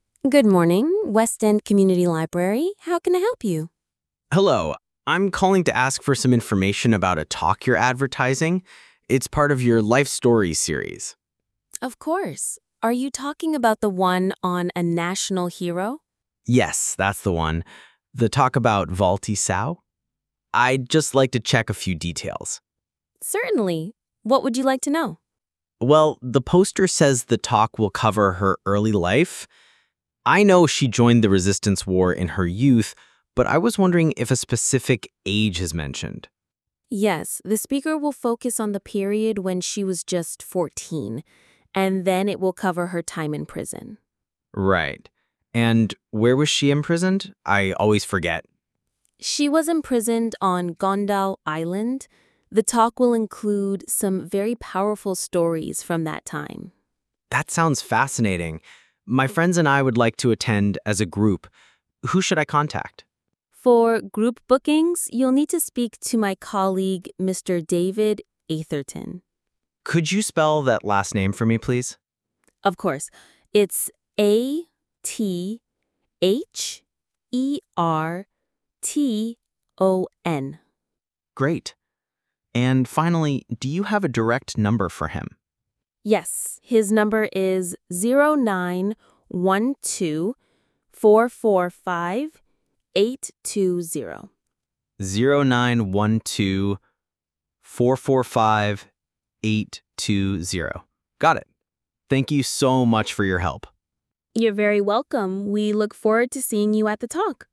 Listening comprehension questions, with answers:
Complete the notes below. Write ONE WORD AND/OR A NUMBER for each answer.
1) Topic: The life of a national (1) ..................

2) Joining the resistance during her (2) ..................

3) Time spent in prison on (3) .................. Island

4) Contact person: Mr. David (4) ..................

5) Phone number: (5) ..................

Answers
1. hero
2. youth
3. Con Dao
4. Atherton
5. 0912445820

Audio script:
Librarian: Good morning, Westend Community Library, how can I help you?
Student: Hello. I'm calling to ask for some information about a talk you're advertising. It's part of your 'Life Stories' series.
Librarian: Of course. Are you talking about the one on a national (1) hero?
Student: Yes, that's the one. I'd just like to check a few details.
Librarian: Certainly. What would you like to know?
Student: Well, the poster says the talk will cover her early life. I know she joined the resistance war in her (2) youth, but I was wondering if a specific age is mentioned?
Librarian: Yes, the speaker will focus on the period when she was just 14. And then it will cover her time in prison.
Student: Right. And where was she imprisoned? I always forget.
Librarian: She was imprisoned on (3) Con Dao Island. The talk will include some very powerful stories from that time.
Student: That sounds fascinating. My friends and I would like to attend as a group. Who should I contact?
Librarian: For group bookings, you'll need to speak to my colleague, Mr. David (4) Atherton.
Student: Could you spell that last name for me, please?
Librarian: Of course. It's A-T-H-E-R-T-O-N.
Student: Great. And finally, do you have a direct number for him?
Librarian: Yes, his number is (5) 0912 445 820.
Student: 0912 445 820. Got it. Thank you so much for your help.
Librarian: You're very welcome. We look forward to seeing you at the talk.

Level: B1